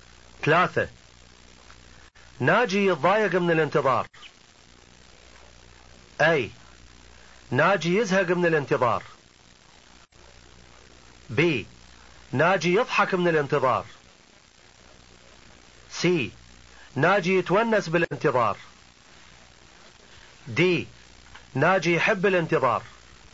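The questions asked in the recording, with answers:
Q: ثلاثة ناجي يتضايق من الانتظار.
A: A: ناجي يزهق من الانتظار.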